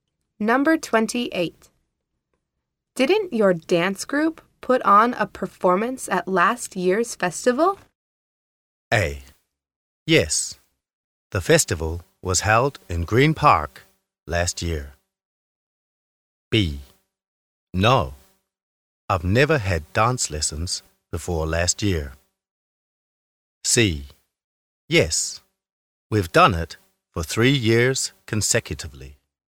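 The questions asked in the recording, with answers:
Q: Didn't your dance group put on a performance at last year's festival?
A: C: Yes, we've done it for 3 years consecutively.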